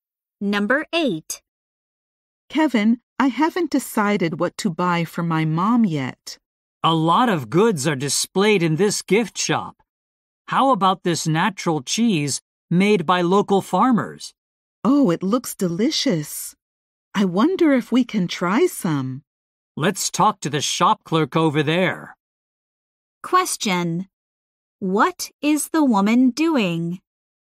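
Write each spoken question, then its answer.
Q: What is the woman doing?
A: Looking for a gift for her mom.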